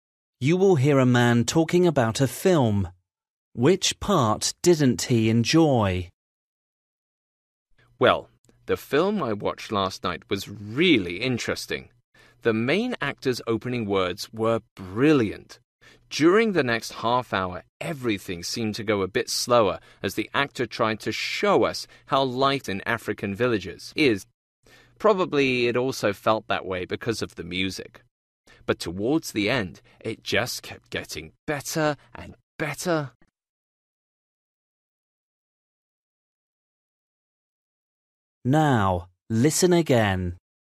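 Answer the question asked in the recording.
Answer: The middle part, after the opening, which felt slow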